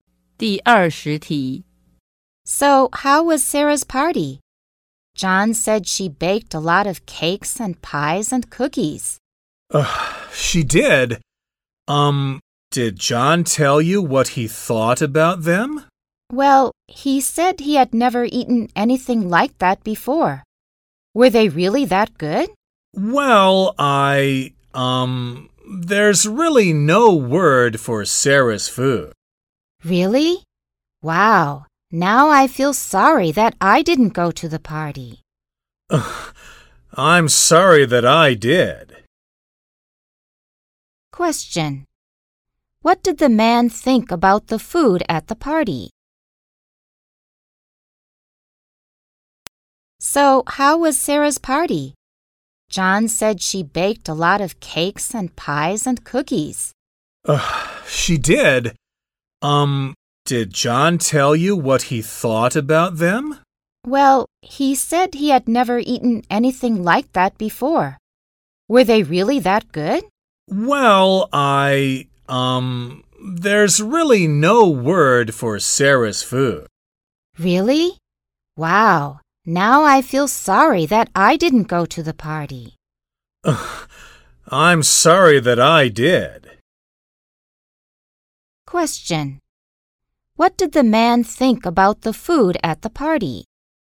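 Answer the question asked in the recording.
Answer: He thought it was bad.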